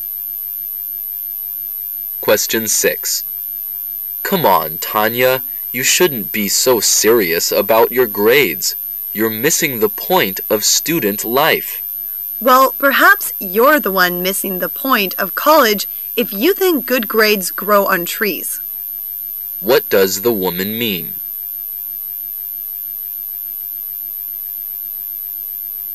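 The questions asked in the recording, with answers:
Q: What does the woman mean?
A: Good grades require hard work; they don't come easily.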